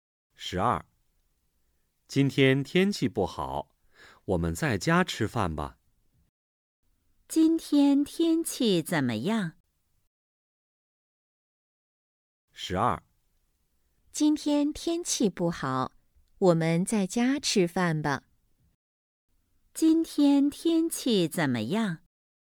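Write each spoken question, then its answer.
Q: 今天天气怎么样?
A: 不好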